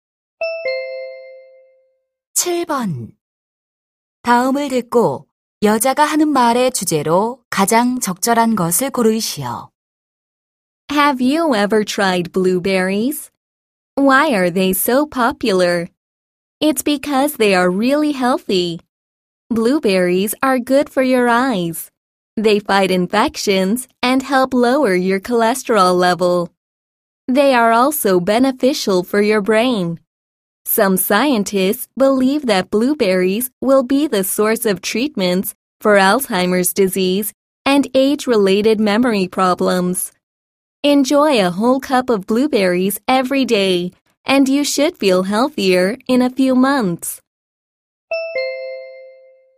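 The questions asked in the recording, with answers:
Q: 다음을 듣고 여자가 하는 말의 주제로 가장 적절한 것을 고르시오.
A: 블루베리가 건강에 주는 이점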